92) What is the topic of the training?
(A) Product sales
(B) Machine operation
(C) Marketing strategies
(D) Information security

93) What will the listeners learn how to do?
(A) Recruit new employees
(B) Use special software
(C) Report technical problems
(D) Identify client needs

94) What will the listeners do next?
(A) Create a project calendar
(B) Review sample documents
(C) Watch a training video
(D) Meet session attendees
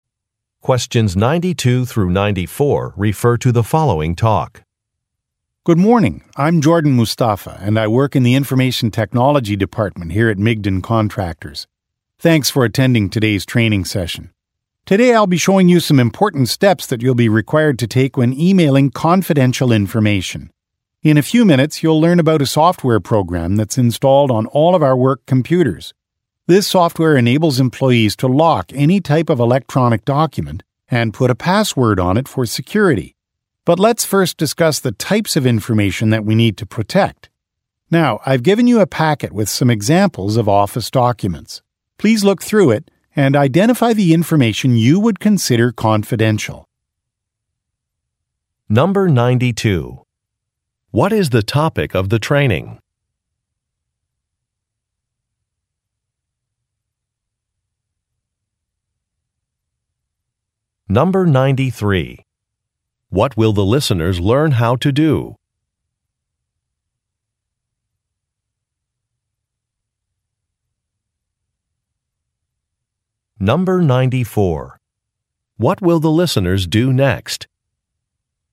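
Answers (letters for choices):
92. D
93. B
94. B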